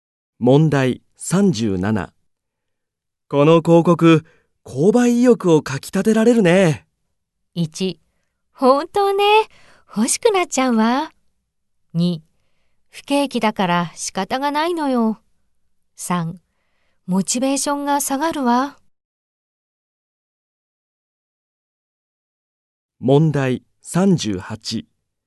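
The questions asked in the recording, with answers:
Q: この広告、購買意欲をかきたてられるね。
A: 1: 本当ね。欲しくなっちゃうわ。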